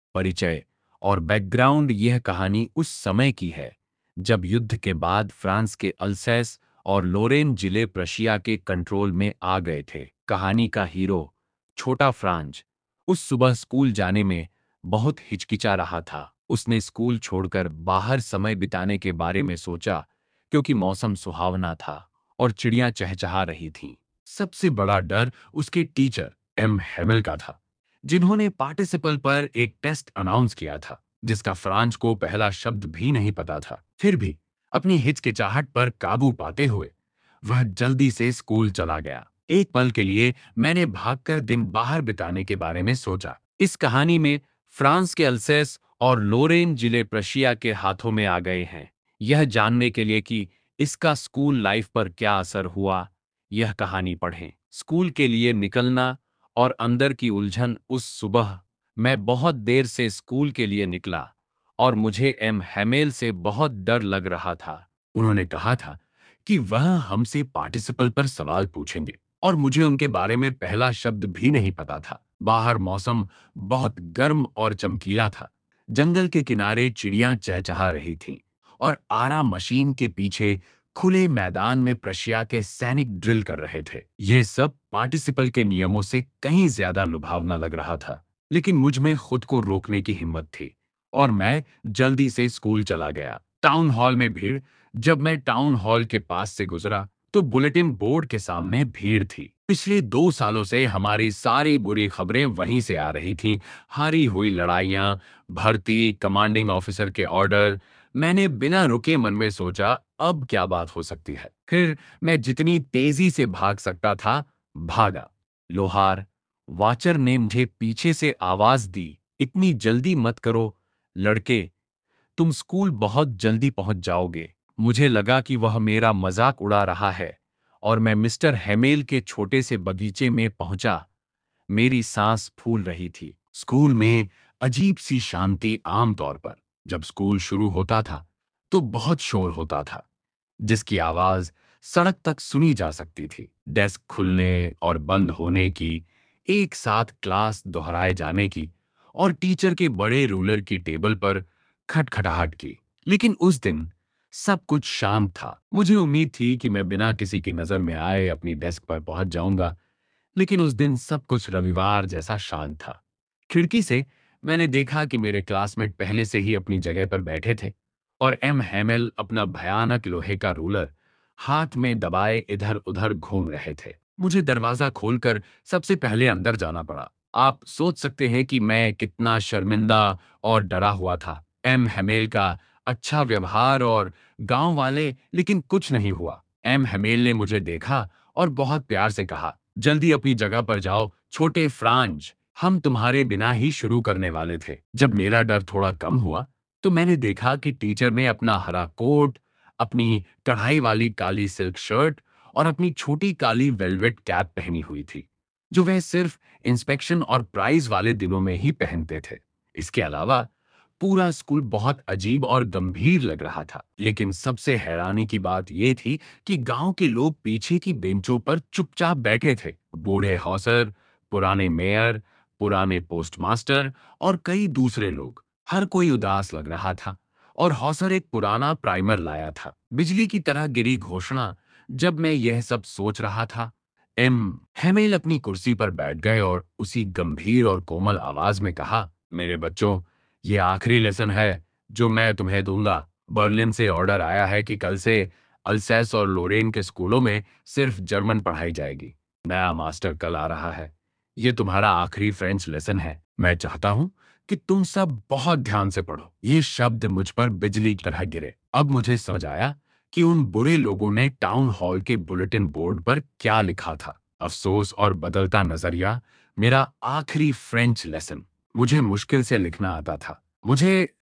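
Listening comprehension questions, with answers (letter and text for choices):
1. What was Franz expected to be prepared with for school that day?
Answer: Franz was expected to be prepared with participles that day.

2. What did Franz notice that was unusual about the school that day?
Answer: Usually, there was a great bustle in the school. But that day it was as still as Sunday morning.

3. What was Franz afraid of while going to school that morning?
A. Being bullied by classmates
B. Getting scolded for not learning participles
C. The Prussian soldiers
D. A surprise test on History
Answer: B. Getting scolded for not learning participles

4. What did the "Bulletin Board" usually bring to the people of Alsace?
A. Good news about festivals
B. Bad news, like lost battles and drafts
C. Holiday announcements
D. Messages from the Mayor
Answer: B. Bad news, like lost battles and drafts

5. Who were sitting on the back benches of the classroom?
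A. New students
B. Prussian soldiers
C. The village elders (Old Hauser, former Mayor, etc.)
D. Parents of the children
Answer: C. The village elders (Old Hauser, former Mayor, etc.)

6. What order had come from Berlin?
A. To close all schools in Alsace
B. To teach only German in the schools of Alsace and Lorraine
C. To arrest M. Hamel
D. To celebrate a public holiday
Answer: B. To teach only German in the schools of Alsace and Lorraine

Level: Class 12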